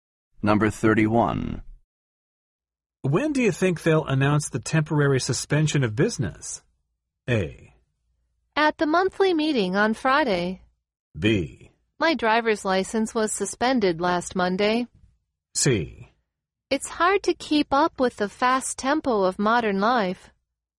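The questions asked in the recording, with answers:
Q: When do you think they'll announce the temporary suspension of business?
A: A: At the monthly meeting on Friday.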